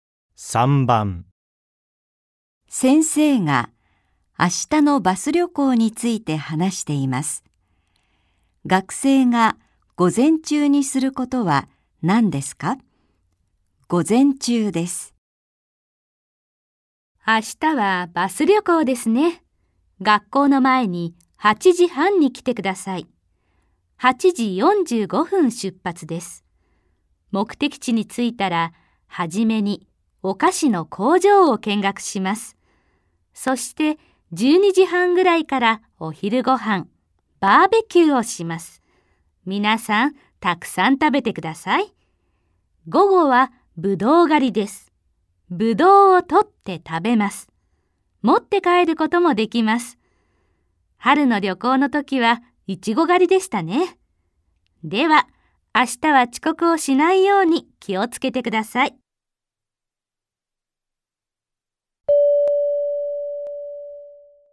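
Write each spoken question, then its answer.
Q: 学生が午前中にすることは何ですか?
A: お菓子の工場を見学する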